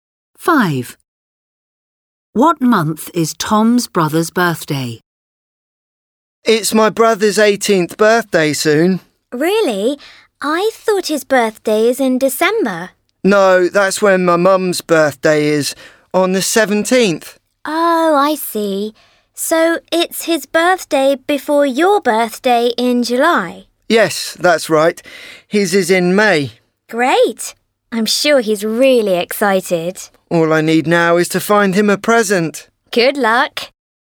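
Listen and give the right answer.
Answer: May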